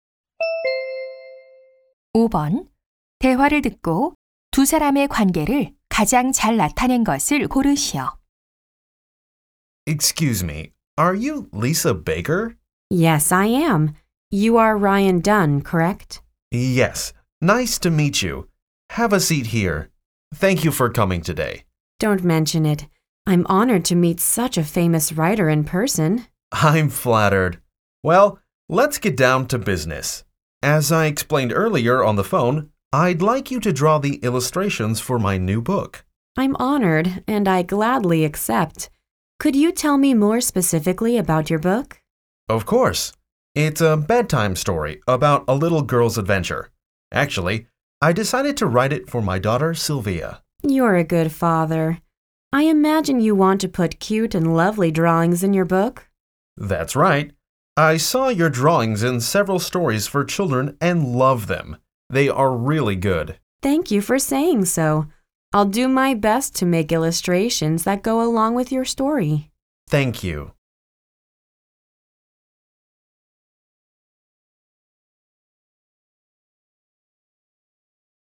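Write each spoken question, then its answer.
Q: 대화를 듣고 두 사람의 관계를 가장 잘 나타낸 것을 고르시오.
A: 작가 - 삽화가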